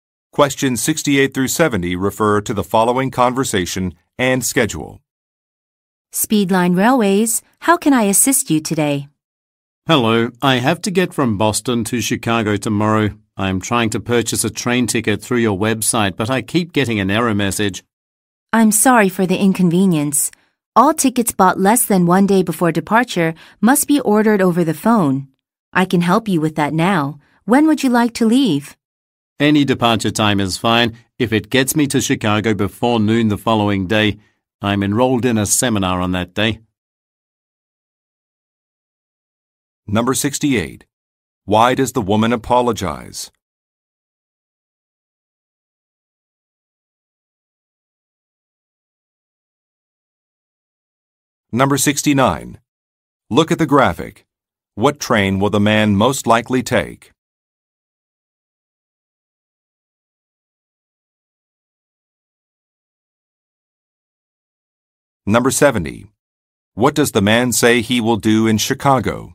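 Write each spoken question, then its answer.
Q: Why does the woman apologize?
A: The man keeps getting an error message when buying a ticket on the website

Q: What does the man say he will do in Chicago?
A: Attend a seminar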